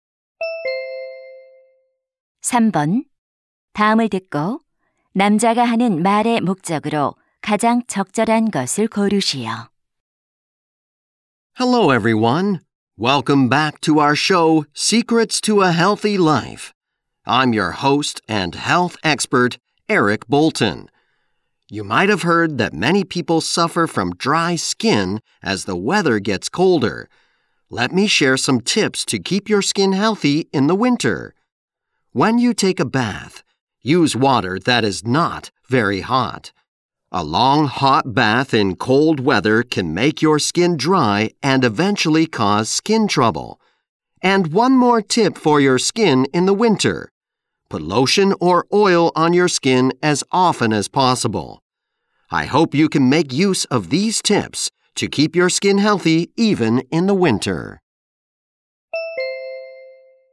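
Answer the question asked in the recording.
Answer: 겨울철 피부 건강을 지키는 방법을 알려 주려고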